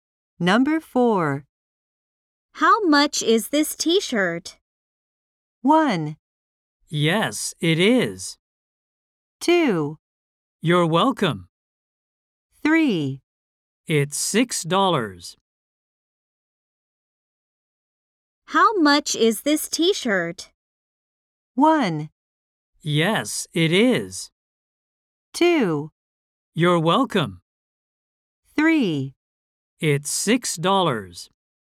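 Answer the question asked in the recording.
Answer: 3: It's $6.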